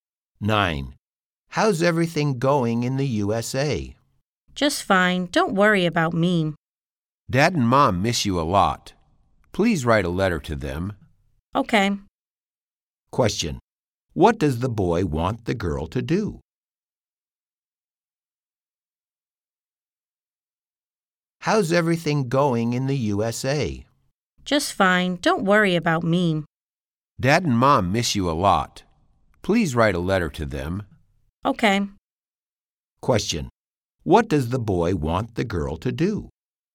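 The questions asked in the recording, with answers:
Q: What does the boy want the girl to do?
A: Write a letter to their parents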